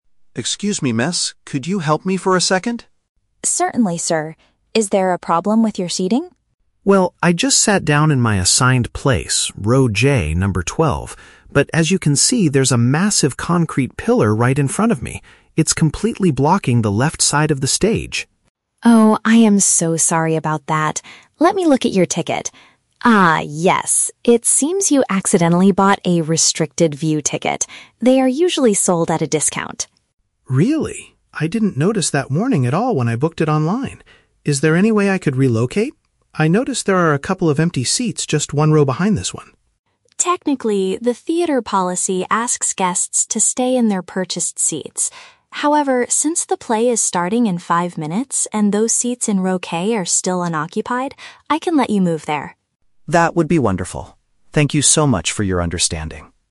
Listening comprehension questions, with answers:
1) What is the man mainly complaining about?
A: A large architectural object is hiding part of the performance area.

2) Why does the man have a bad seat?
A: He purchased a specific type of cheaper ticket by mistake.

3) What does the usher finally allow the man to do?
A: Transfer to an unoccupied place slightly further back.

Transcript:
Audience Member: Excuse me, miss? Could you help me for a second?
Usher: Certainly, sir. Is there a problem with your seating?
Audience Member: Well, I just sat down in my assigned place, row J, number 12. But as you can see, there's a massive concrete pillar right in front of me. It's completely blocking the left side of the stage.
Usher: Oh, I am so sorry about that. Let me look at your ticket. Ah, yes. It seems you accidentally bought a "restricted view" ticket. They are usually sold at a discount.
Audience Member: Really? I didn't notice that warning at all when I booked it online. Is there any way I could relocate? I noticed there are a couple of empty seats just one row behind this one.
Usher: Technically, the theater policy asks guests to stay in their purchased seats. However, since the play is starting in five minutes and those seats in row K are still unoccupied, I can let you move there.